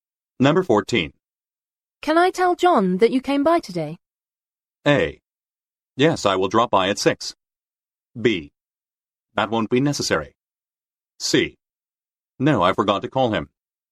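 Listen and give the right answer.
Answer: B: That won't be necessary.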